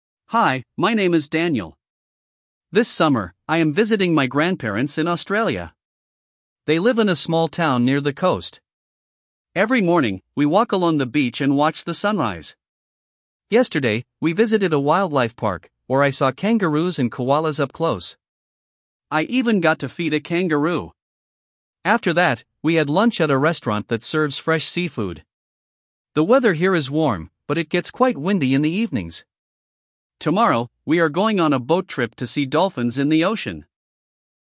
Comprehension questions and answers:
1. Прослушайте текст и определите, какие из приведённых утверждений A–E соответствуют содержанию текста (1 – Right), какие не соответствуют (2 – False). Вы услышите текст дважды.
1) Daniel is visiting his grandparents in Canada.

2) He walks along the beach every morning.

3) Yesterday, he saw lions and tigers at the wildlife park.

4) He had lunch at a seafood restaurant.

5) Tomorrow, they will go hiking in the mountains.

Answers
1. False
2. Right
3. False
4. Right
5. False

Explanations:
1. He is in Australia, not Canada.
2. He walks along the beach every morning.
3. He saw kangaroos and koalas, not lions and tigers.
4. He had lunch at a seafood restaurant.
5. They will go on a boat trip, not hiking.

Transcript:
Hi, my name is Daniel. This summer, I am visiting my grandparents in Australia. They live in a small town near the coast. Every morning, we walk along the beach and watch the sunrise. Yesterday, we visited a wildlife park, where I saw kangaroos and koalas up close. I even got to feed a kangaroo! After that, we had lunch at a restaurant that serves fresh seafood. The weather here is warm, but it gets quite windy in the evenings. Tomorrow, we are going on a boat trip to see dolphins in the ocean!

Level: 6 класс